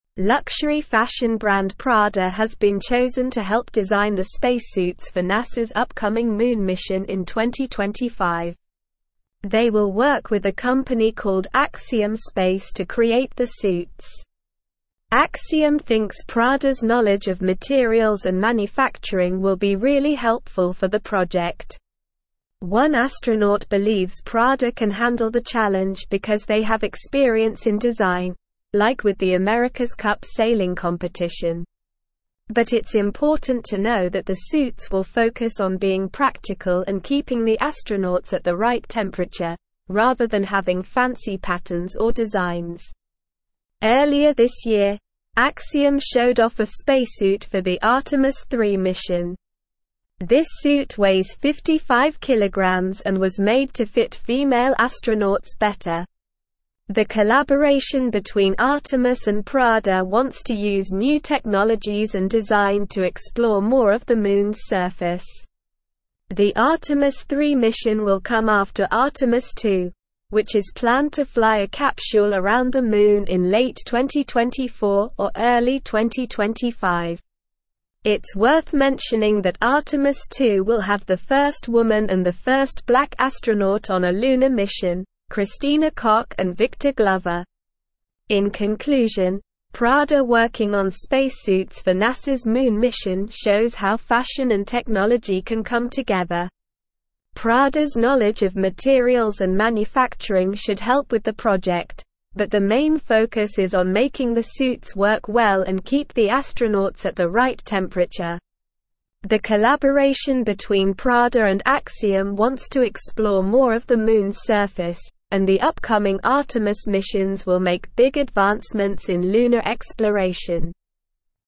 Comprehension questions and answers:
Listen and Fill in the Gaps:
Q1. Luxury fashion brand Prada has been (1)______ to help design the space suits for NASA's upcoming Moon (2)______ in 2025.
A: chosen

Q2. Luxury fashion brand Prada has been (1)______ to help design the space suits for NASA's upcoming Moon (2)______ in 2025.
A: mission

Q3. They will work with a company (3)______ Axiom (4)______ to create the suits.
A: called

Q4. They will work with a company (3)______ Axiom (4)______ to create the suits.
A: Space

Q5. But it's important to know that the suits will focus on being practical and (5)______ the astronauts at the right temperature, rather than having fancy (6)______ or designs.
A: keeping

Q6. But it's important to know that the suits will focus on being practical and (5)______ the astronauts at the right temperature, rather than having fancy (6)______ or designs.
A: patterns

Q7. This suit (7)______ 55kg and was made to fit female astronauts better.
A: weighs

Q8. The collaboration between Artemis and Prada (8)______ to use new technologies and design to explore more of the Moon's surface.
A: wants

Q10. It's worth mentioning that Artemis 2 will have the first woman and the first black astronaut on a lunar mission, (10)______ Kock and Victor (11)______.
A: Christina

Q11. It's worth mentioning that Artemis 2 will have the first woman and the first black astronaut on a lunar mission, (10)______ Kock and Victor (11)______.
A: Glover

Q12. In (12)______, Prada working on space suits for NASA's Moon mission shows how fashion and technology can come together.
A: conclusion

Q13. Prada's (13)______ of materials and (14)______ should help with the project, but the main focus is on making the suits work well and keep the astronauts at the (15)______ temperature.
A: knowledge

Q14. Prada's (13)______ of materials and (14)______ should help with the project, but the main focus is on making the suits work well and keep the astronauts at the (15)______ temperature.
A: manufacturing

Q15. Prada's (13)______ of materials and (14)______ should help with the project, but the main focus is on making the suits work well and keep the astronauts at the (15)______ temperature.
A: right

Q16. The collaboration between Prada and Axiom wants to explore more of the Moon's surface, and the upcoming Artemis missions will make big advancements in lunar (16)______.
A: exploration

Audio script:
Luxury fashion brand Prada has been chosen to help design the space suits for NASA's upcoming Moon mission in 2025. They will work with a company called Axiom Space to create the suits. Axiom thinks Prada's knowledge of materials and manufacturing will be really helpful for the project. One astronaut believes Prada can handle the challenge because they have experience in design, like with the America's Cup sailing competition. But it's important to know that the suits will focus on being practical and keeping the astronauts at the right temperature, rather than having fancy patterns or designs.
Earlier this year, Axiom showed off a spacesuit for the Artemis 3 mission. This suit weighs 55kg and was made to fit female astronauts better. The collaboration between Artemis and Prada wants to use new technologies and design to explore more of the Moon's surface. The Artemis 3 mission will come after Artemis 2, which is planned to fly a capsule around the Moon in late 2024 or early 2025. It's worth mentioning that Artemis 2 will have the first woman and the first black astronaut on a lunar mission, Christina Kock and Victor Glover.
In conclusion, Prada working on space suits for NASA's Moon mission shows how fashion and technology can come together. Prada's knowledge of materials and manufacturing should help with the project, but the main focus is on making the suits work well and keep the astronauts at the right temperature. The collaboration between Prada and Axiom wants to explore more of the Moon's surface, and the upcoming Artemis missions will make big advancements in lunar exploration.

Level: Level 3